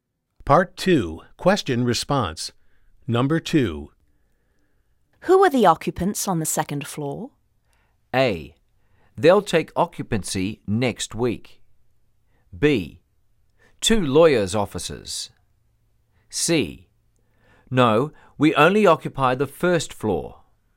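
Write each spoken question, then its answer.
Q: Who are the occupants on the second floor?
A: B: Two lawyers' offices.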